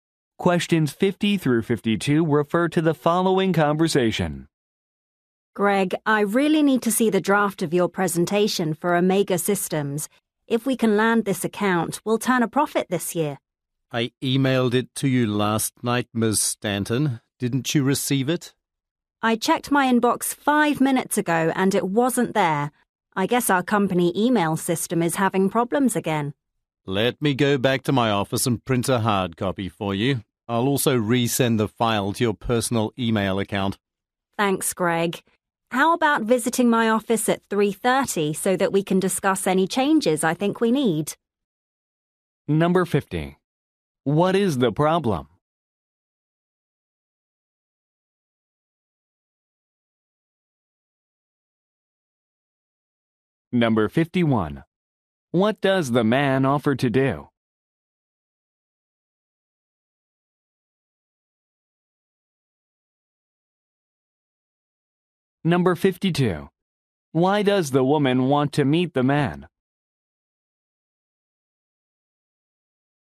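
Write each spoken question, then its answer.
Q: What is the problem?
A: The woman didn't receive the emailed presentation draft

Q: What does the man offer to do?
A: Print a hard copy and resend the file

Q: Why does the woman want to meet the man?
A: To discuss changes to the presentation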